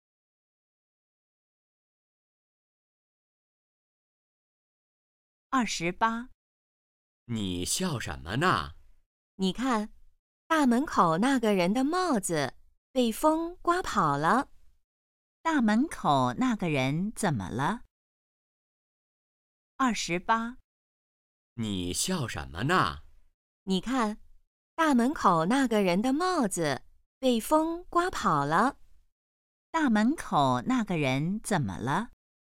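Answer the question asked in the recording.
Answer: 帽子被风刮跑了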